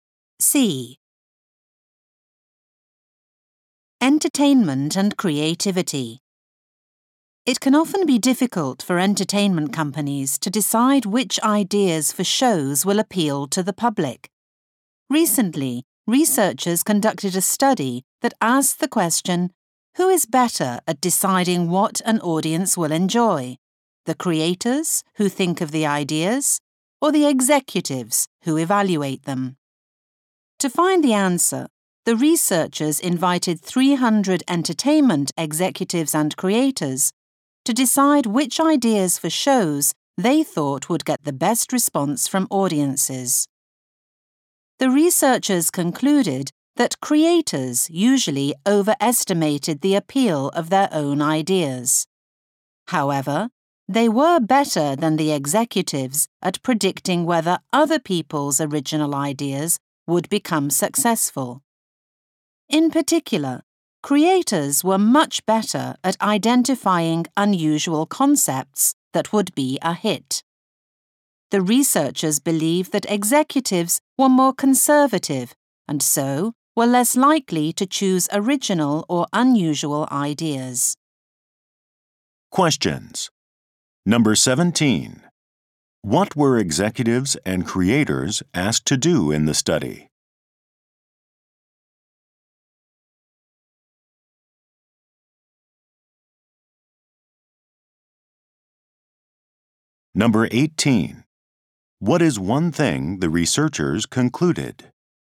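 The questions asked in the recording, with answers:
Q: What were executives and creators asked to do in the study?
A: Decide which ideas for shows would get the best audience response.

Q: What is one thing the researchers concluded?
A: Creators overestimated their own ideas but were better at predicting the success of other people's ideas.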